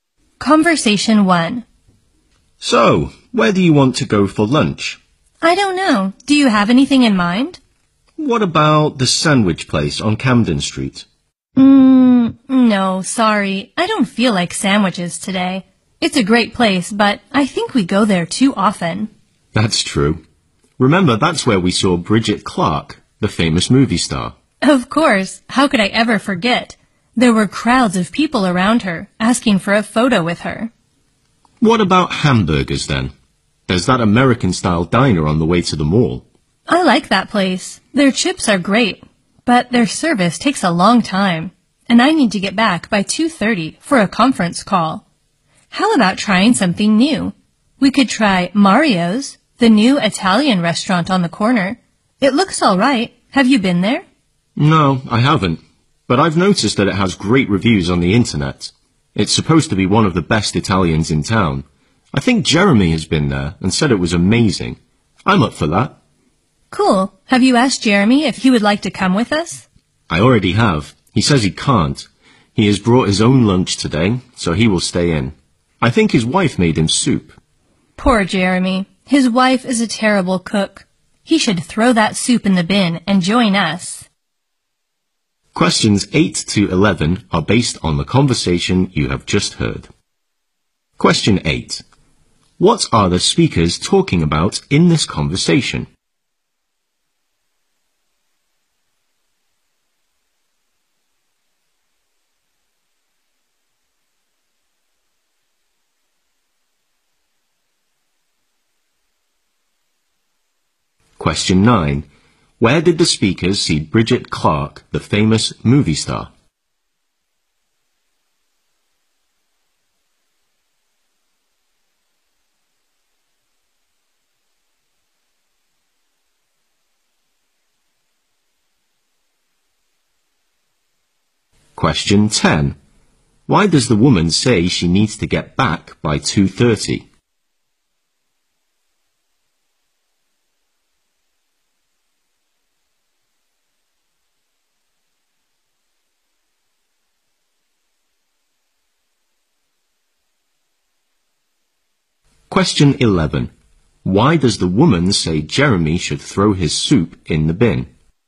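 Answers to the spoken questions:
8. Where to go for lunch.
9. At the sandwich place on Camden Street.
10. She has a conference call.
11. His wife is a terrible cook.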